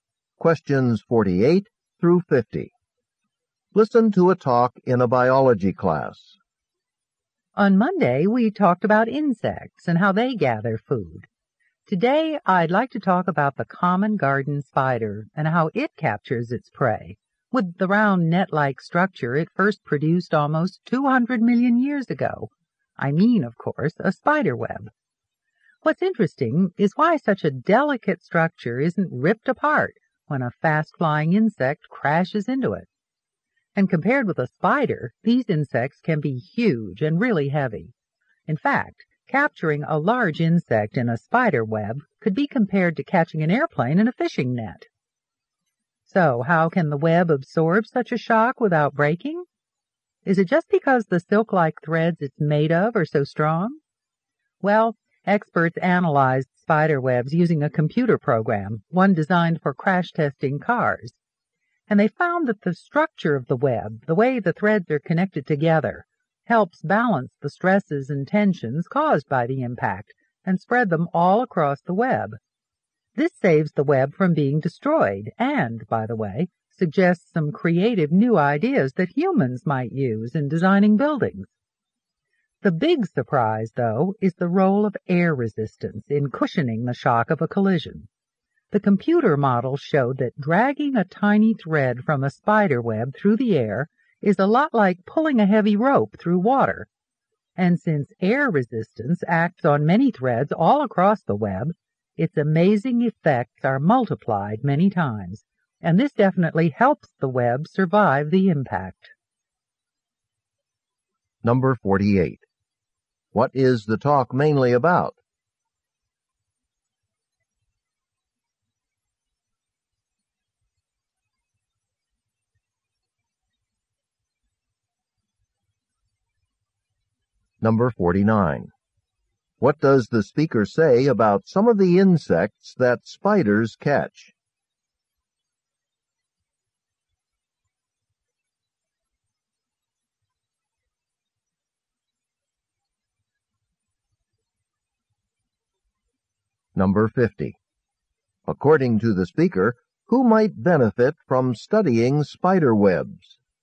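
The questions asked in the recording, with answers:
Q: What is the talk mainly about?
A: How spider webs withstand the impact of insects

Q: What does the speaker say about some of the insects that spiders catch?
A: They are much larger and heavier than the spider

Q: According to the speaker, who might benefit from studying spider webs?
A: Designers of buildings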